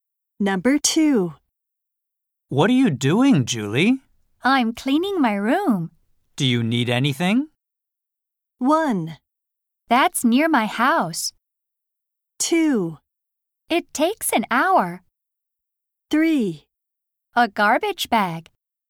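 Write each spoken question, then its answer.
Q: Do you need anything?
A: 3: A garbage bag.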